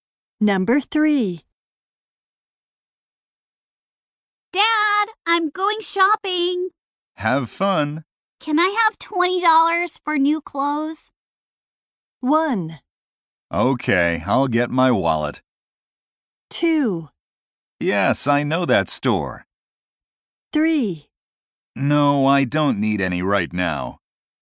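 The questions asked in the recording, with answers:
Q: Can I have $20 for new clothes?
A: 1: Okay, I'll get my wallet.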